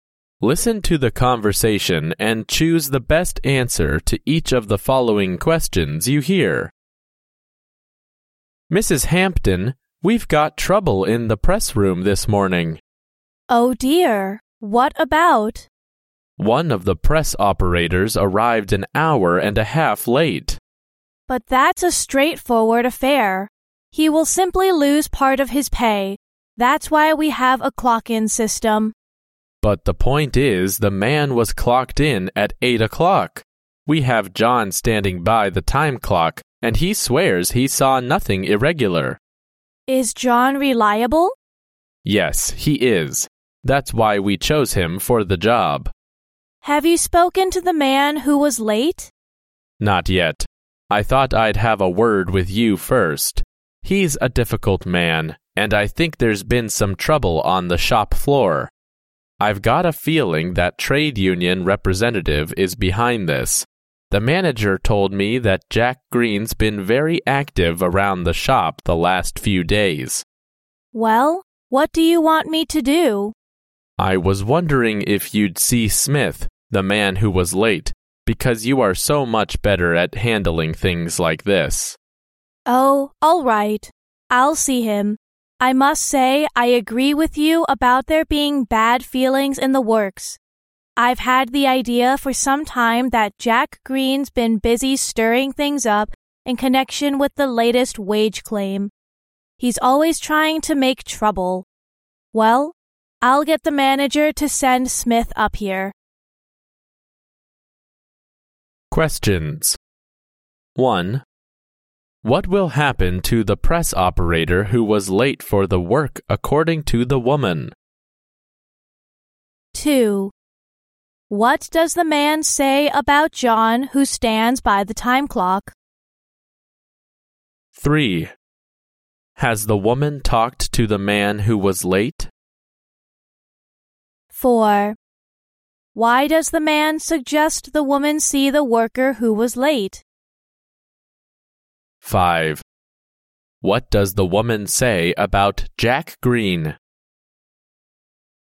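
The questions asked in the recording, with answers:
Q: What will happen to the press operator who was late for the work according to the woman?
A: He will lose part of his pay.

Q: What does the man say about John who stands by the time clock?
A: He is reliable; he swears he saw nothing irregular.

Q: Why does the man suggest the woman see the worker who was late?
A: Because she is much better at handling things like this.

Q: What does the woman say about Jack Green?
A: He is always trying to make trouble, stirring things up over the latest wage claim.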